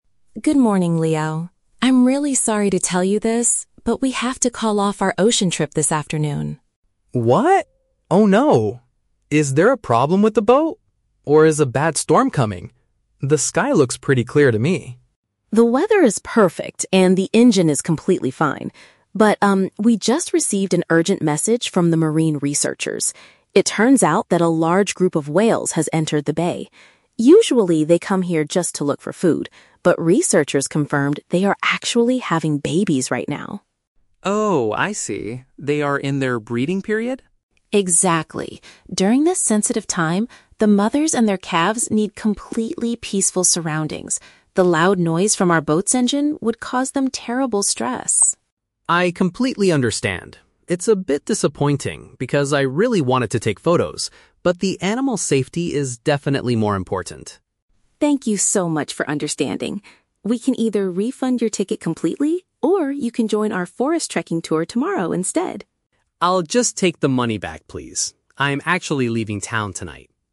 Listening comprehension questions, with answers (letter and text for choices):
Listen to a conversation between a tour guide and a tourist. Choose the correct answer (A, B, or C) for each question.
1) Why is the afternoon ocean trip cancelled?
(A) Because of dangerous weather conditions.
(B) Because the animals require a silent environment.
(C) Because the boat needs to be repaired.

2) What are the whales currently doing in the bay?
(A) They are hunting for small fish.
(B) They are hiding from dangerous predators.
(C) They are producing new offspring.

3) What does the tourist decide to do at the end?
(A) He chooses to get his payment returned.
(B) He agrees to go on a walk in the woods tomorrow.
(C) He decides to stay in the area for one more night.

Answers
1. (B) Because the animals require a silent environment.
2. (C) They are producing new offspring.
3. (A) He chooses to get his payment returned.

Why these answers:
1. Emma explains that the whales need "completely peaceful surroundings" because the boat's noise would cause them stress. "Peaceful surroundings" and no noise are paraphrased as a "silent environment." Why traps are wrong: Options A and C are Traps. Leo guesses there might be a "bad storm" (weather) or a "problem with the boat," but Emma explicitly says the weather is perfect and the engine is fine.
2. Emma confirms that the whales are "having babies right now" (breeding period). "Having babies" is paraphrased as "producing new offspring." Why traps are wrong: Option A is a Trap. Emma mentions that they usually come here to "look for food" (hunt for fish), but clarifies that today they are having babies. Option B is plausible for wild animals, but predators are never mentioned.
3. Leo says, "I'll just take the money back, please." "Take the money back" is paraphrased as "get his payment returned." Why traps are wrong: Option B is a Trap. Emma offers the "forest trekking tour tomorrow" (walk in the woods), but Leo rejects it. Option C is a Trap because Leo says he is "leaving town tonight," which means he will not stay for another night.

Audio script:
Emma: Good morning, Leo. I'm really sorry to tell you this, but we have to call off our ocean trip this afternoon.
Leo: What? Oh no... is there a problem with the boat? Or is a bad storm coming? The sky looks pretty clear to me.
Emma: The weather is perfect, and the engine is completely fine. But, um, we just received an urgent message from the marine researchers. It turns out that a large group of whales has entered the bay. Usually, they come here just to look for food, but researchers confirmed they are actually having babies right now.
Leo: Oh, I see. They are in their breeding period?
Emma: Exactly. During this sensitive time, the mothers and their calves need completely peaceful surroundings. The loud noise from our boat's engine would cause them terrible stress.
Leo: I completely understand. It's a bit disappointing because I really wanted to take photos, but the animals' safety is definitely more important.
Emma: Thank you so much for understanding. We can either refund your ticket completely, or you can join our forest trekking tour tomorrow instead.
Leo: I'll just take the money back, please. I'm actually leaving town tonight.